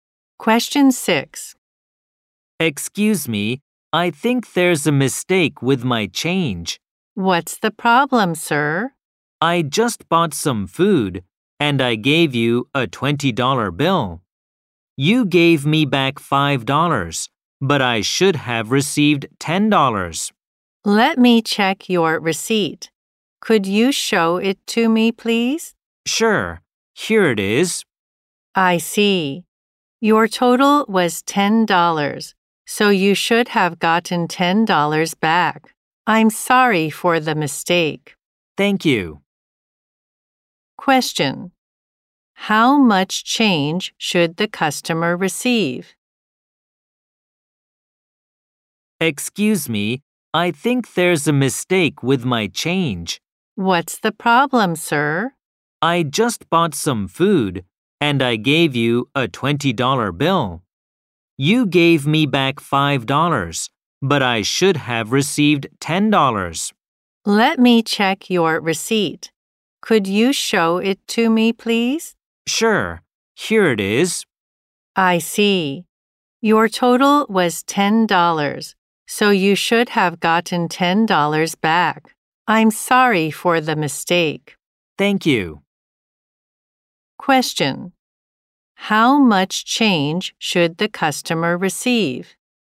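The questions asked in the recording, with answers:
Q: How much change should the customer receive?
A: $10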